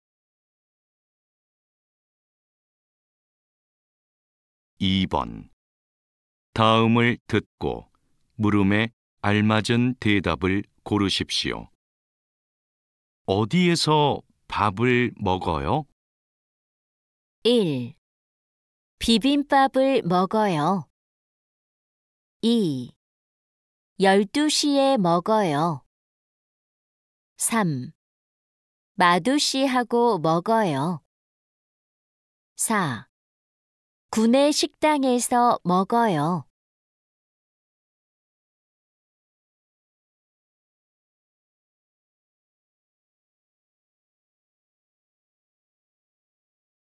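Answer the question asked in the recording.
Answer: 4: 구내 식당에서 먹어요.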